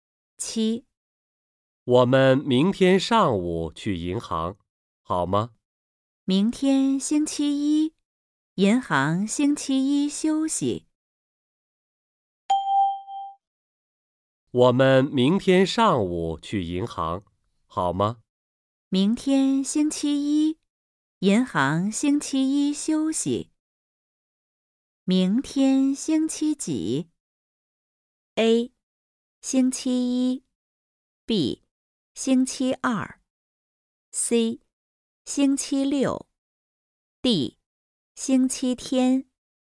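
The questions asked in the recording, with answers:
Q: 明天星期几?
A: A: 星期一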